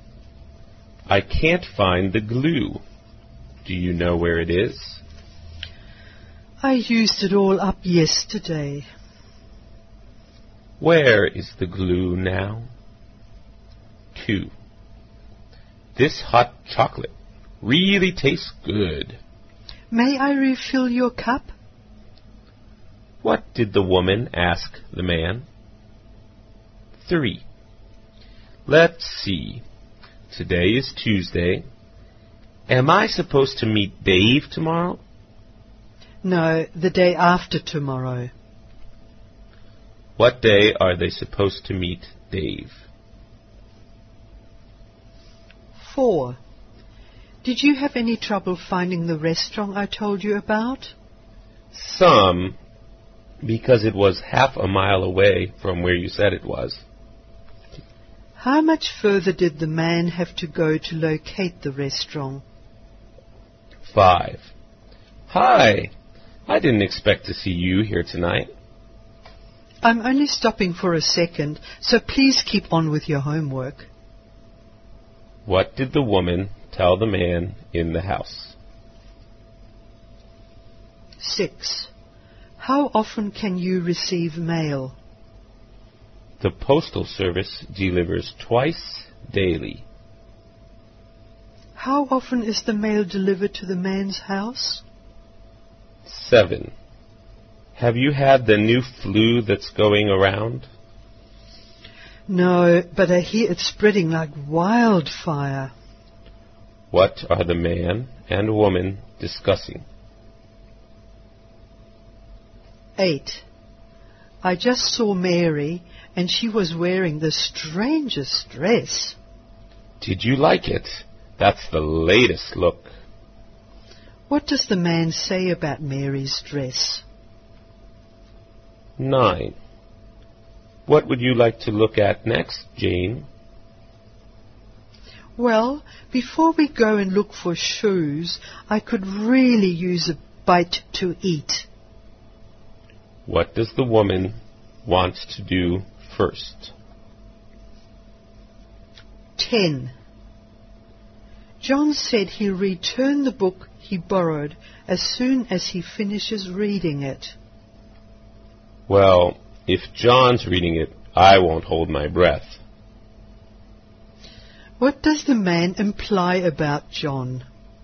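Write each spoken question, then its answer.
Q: Where is the glue now?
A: It's all used up; there is none left.

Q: What did the woman ask the man?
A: Whether he wanted more hot chocolate (a refill).

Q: What day are they supposed to meet Dave?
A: Thursday

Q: How much further did the man have to go to locate the restaurant?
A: Half a mile

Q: How often is the mail delivered to the man's house?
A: Twice a day

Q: What are the man and woman discussing?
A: The new flu that is spreading

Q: What does the woman want to do first?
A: Get something to eat

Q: What does the man imply about John?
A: John won't return the book soon.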